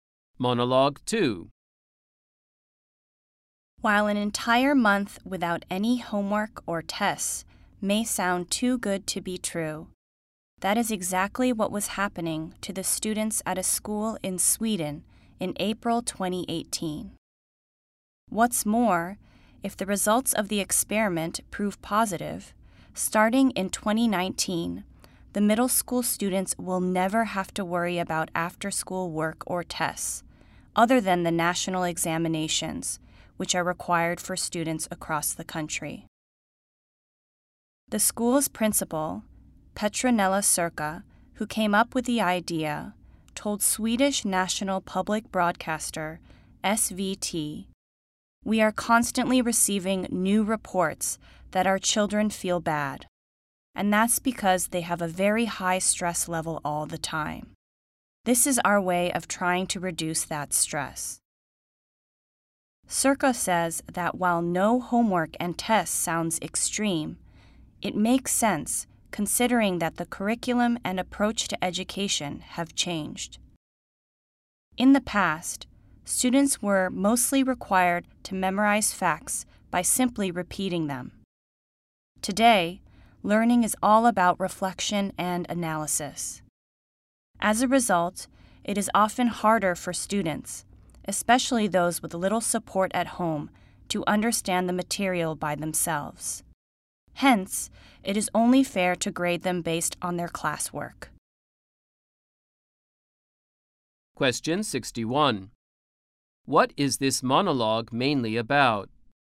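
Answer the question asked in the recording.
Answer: A Swedish school trying no homework or tests to reduce student stress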